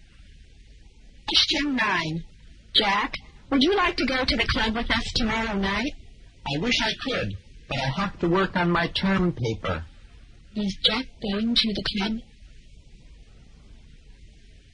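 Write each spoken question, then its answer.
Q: Is Jack going to the club?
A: No, he has to work on his term paper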